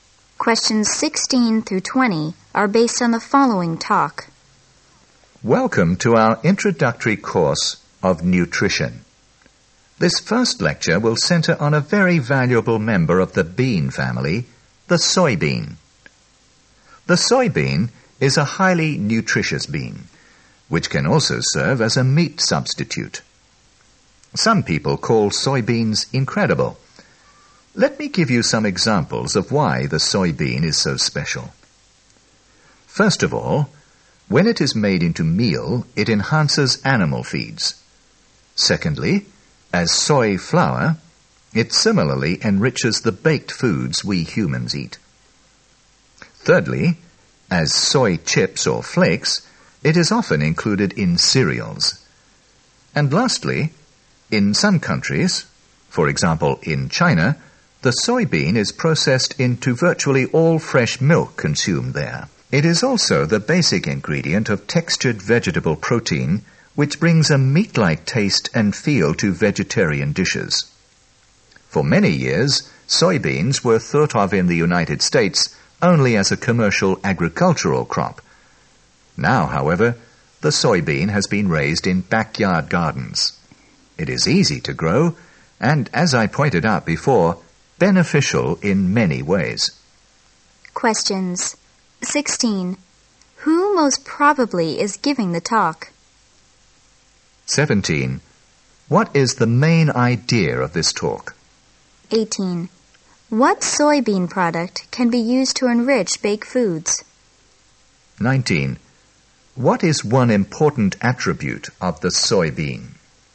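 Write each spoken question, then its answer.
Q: What soybean product can be used to enrich baked foods?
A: Soy flour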